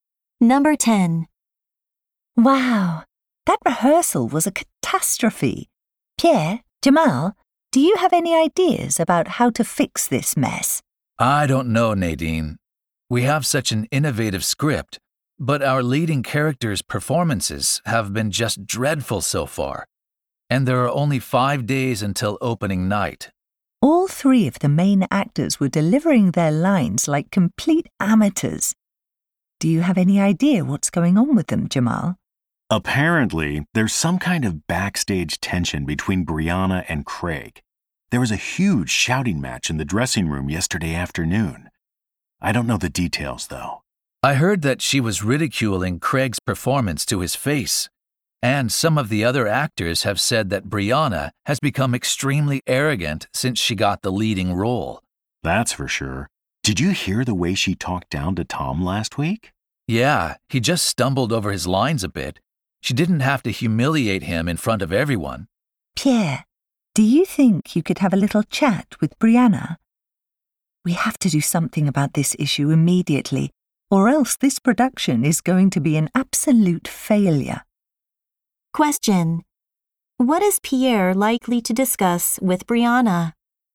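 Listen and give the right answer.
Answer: Her arrogant behavior toward her fellow actors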